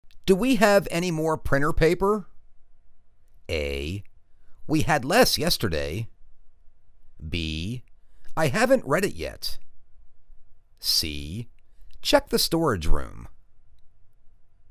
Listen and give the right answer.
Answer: Check the storage room.